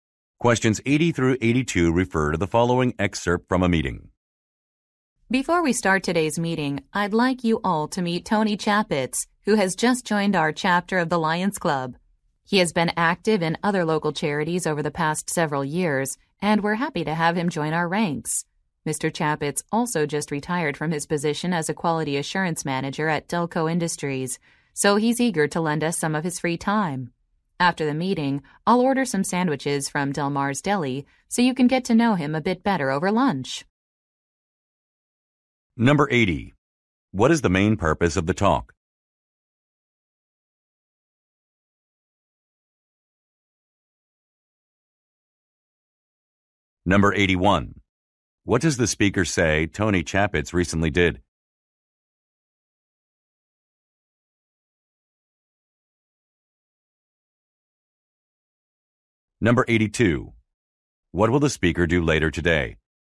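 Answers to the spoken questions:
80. To introduce a new member
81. He retired
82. Order sandwiches for lunch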